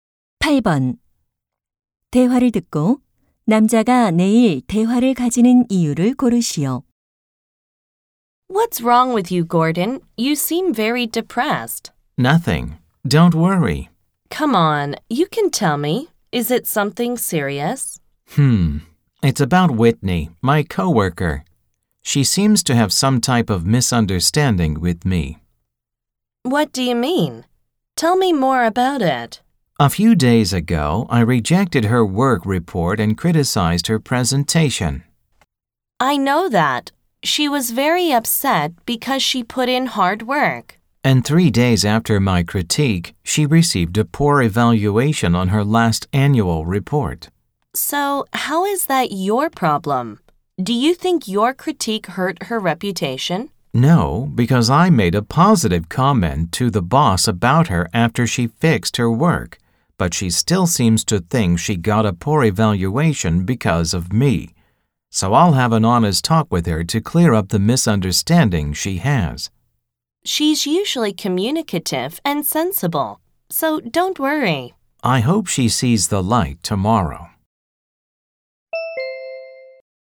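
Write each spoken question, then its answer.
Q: 대화를 듣고 남자가 내일 대화를 가지는 이유를 고르시오.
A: 동료 Whitney의 오해를 풀기 위해서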